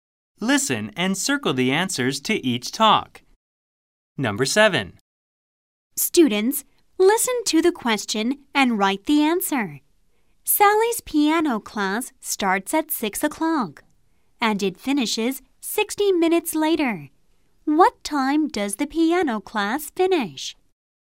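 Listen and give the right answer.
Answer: 7 o'clock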